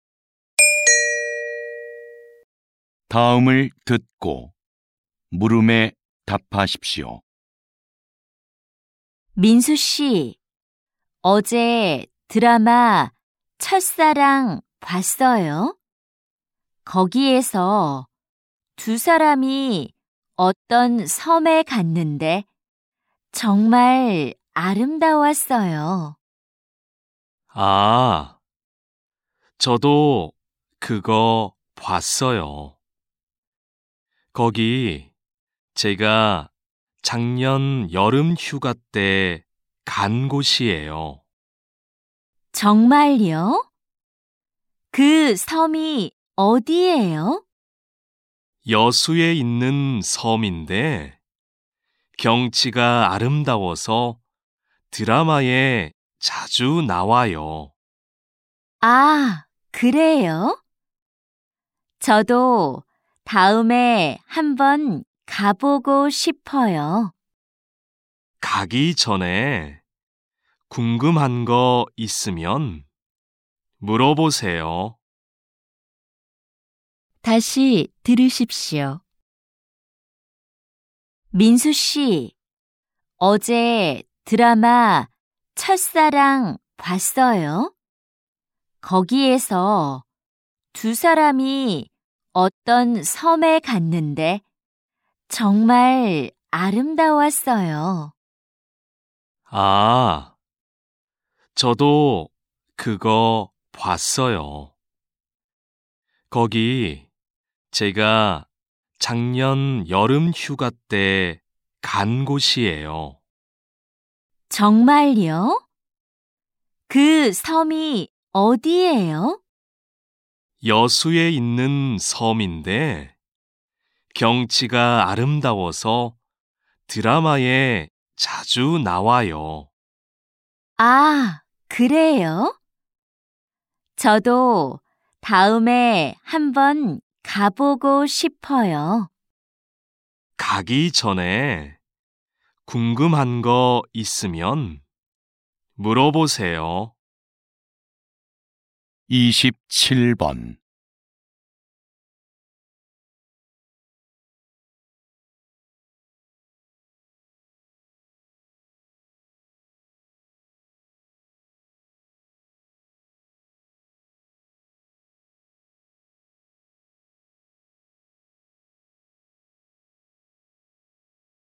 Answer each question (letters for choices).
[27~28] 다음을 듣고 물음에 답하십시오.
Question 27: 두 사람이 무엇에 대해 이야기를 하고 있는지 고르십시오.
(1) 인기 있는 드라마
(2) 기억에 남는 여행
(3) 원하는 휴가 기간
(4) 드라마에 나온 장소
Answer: 4

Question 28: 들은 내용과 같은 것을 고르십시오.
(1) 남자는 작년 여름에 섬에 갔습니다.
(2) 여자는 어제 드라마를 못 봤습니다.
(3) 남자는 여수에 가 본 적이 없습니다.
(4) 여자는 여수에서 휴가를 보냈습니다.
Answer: 1

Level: TOPIK I